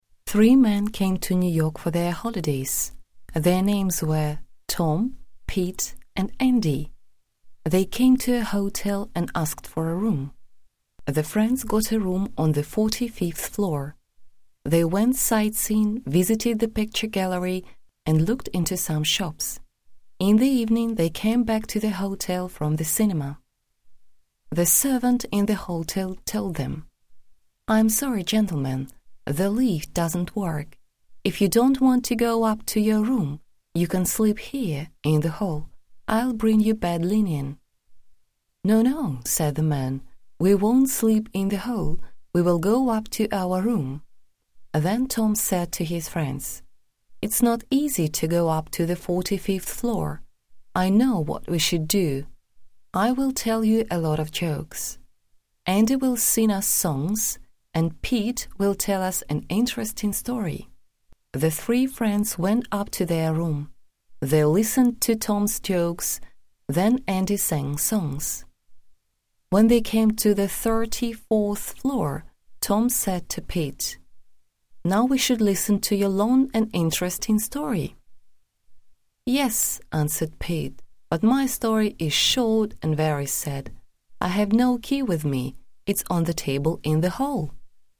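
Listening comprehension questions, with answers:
Complete the sentence with one word from the text. В ответе укажите полученные слова в нужной последовательности от 1 к 3, без каких-либо знаков препинания. Между словами ставьте строго один пробел.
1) Three men came to New York for their __________ .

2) The friends got a room on the forty-fifth ___________.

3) They went__________, visited the picture gallery and looked into some shops.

Mark the sentences true or false. Выберите верный вариант ответа.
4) The three men worked in New York.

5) They got a room in a hotel.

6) They went to the cinema.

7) The lift didn't work.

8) They slept in the hall.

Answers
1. holidays
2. floor
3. sightseeing
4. false
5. true
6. true
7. true
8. false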